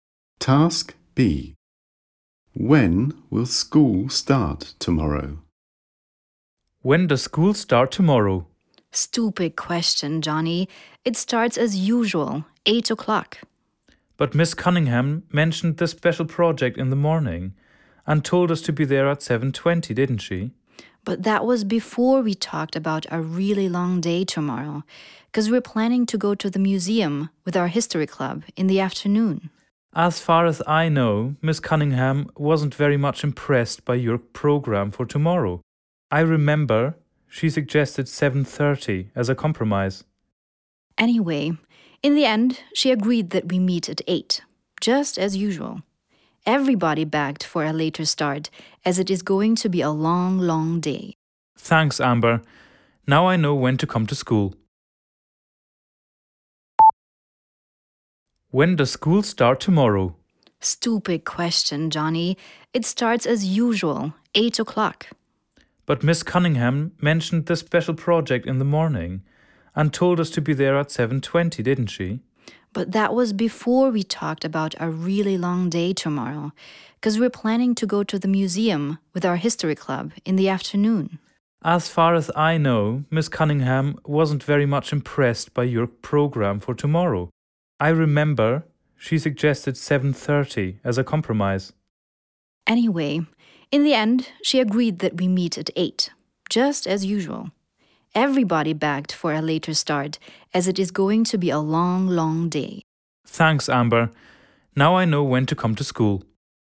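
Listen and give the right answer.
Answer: At 8 o'clock, as usual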